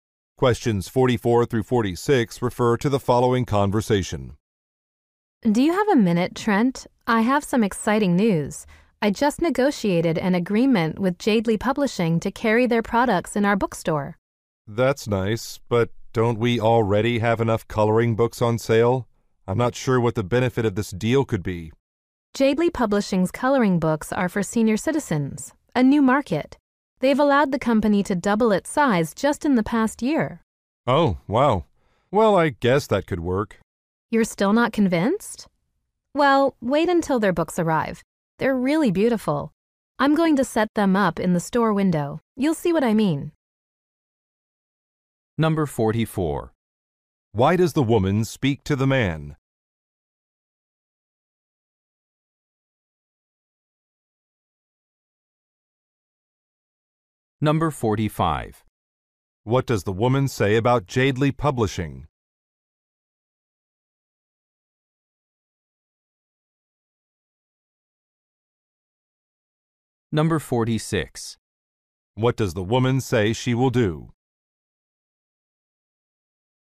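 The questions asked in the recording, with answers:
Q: Why does the woman speak to the man?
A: To share news of a deal with a publisher

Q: What does the woman say about Jadeley Publishing?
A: It has doubled in size in the past year

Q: What does the woman say she will do?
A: Set up the books in the store window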